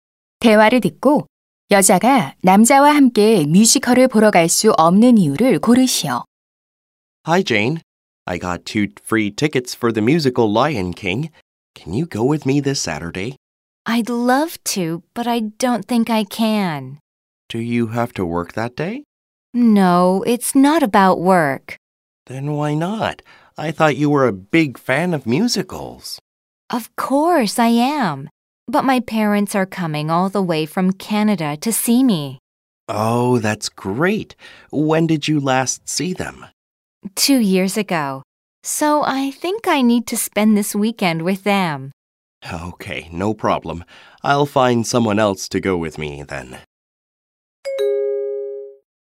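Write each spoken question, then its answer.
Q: 대화를 듣고 여자가 남자와 함께 뮤지컬을 보러 갈 수 없는 이유를 고르시오.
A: 캐나다에서 부모님이 그녀를 보러 오셔서 주말을 함께 보내야 하기 때문에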